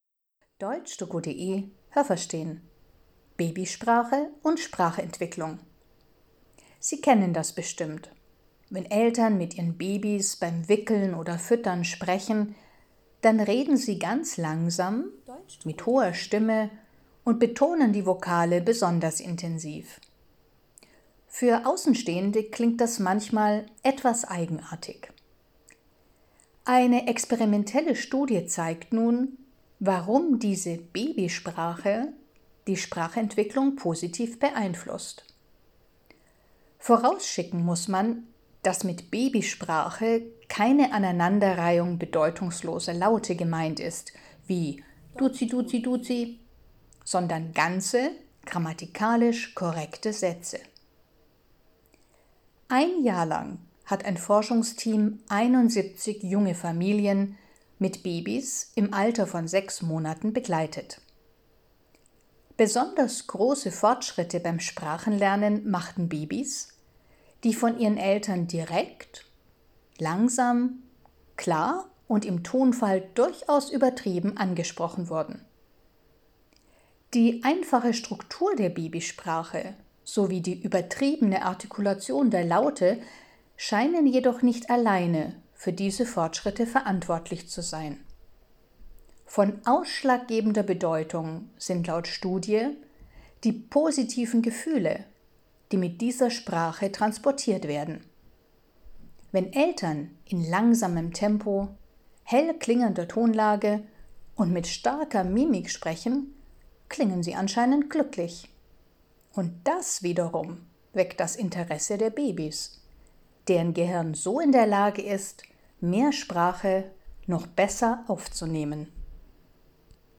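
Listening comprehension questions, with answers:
Haben Sie das gehört? Stimmt diese Aussage?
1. Reden Eltern mit Babys, heben sie z.B. die Vokale besonders hervor, was mitunter seltsam klingt.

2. Die Studie untersucht die Babysprache, die bedeutungslose Laute aneinanderreiht.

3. Ein Forschungsteam hat 71 junge Familien sechs Monate lang begleitet.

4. Babys machten besonders große Fortschritte beim Sprachenlernen, wenn die Eltern klar und übertrieben artikuliert haben.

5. Die einfache Struktur der Babysprache und die übertriebene Artikulation sind die entscheidenden Komponenten beim Sprachenlernen.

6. Wenn Eltern Babysprache benutzen, wirken sie anscheinend glücklich.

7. Weil die Eltern glücklich klingen, sind Babys besonders aufmerksam und ihr Gehirn kann so Sprache besser geistig verarbeiten.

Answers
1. Richtig
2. Falsch
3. Falsch
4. Richtig
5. Falsch
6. Richtig
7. Richtig

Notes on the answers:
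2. Die Studie untersucht Babysprache, die komplette, grammatikalisch korrekte Sätze verwendet.
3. Das Team hat Familien mit sechs Monate alten Babys ein Jahr lang begleitet.
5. Beides spielt wohl eine große Rolle, aber ausschlaggebend sind laut Studie die positiven Gefühle, die in der Babysprache mitschwingen.

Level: C (schwer)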